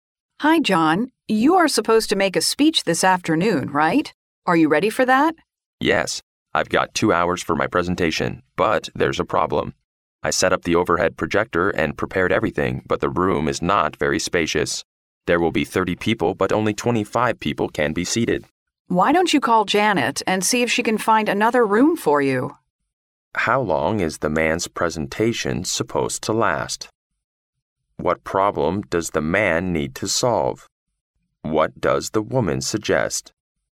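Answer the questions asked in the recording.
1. 2 hours
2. The room is too small; only 25 of 30 people can be seated
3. Call Janet to see if she can find another room

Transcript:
[听力原文] W: Hi, John. You are supposed to make a speech this afternoon, right? Are you ready for that? M: Yes, I've got two hours for my presentation, but there's a problem. I set up the overhead projector and prepared everything, but the room is not very spacious. There will be 30 people, but only 25 people can be seated. W: Why don't you call Janet and see if she can find another room for you?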